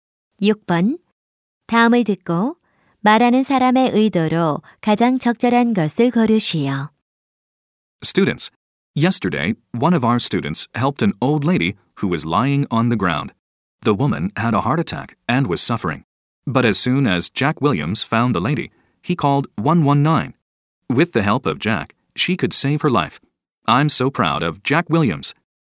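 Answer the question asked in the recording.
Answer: 칭찬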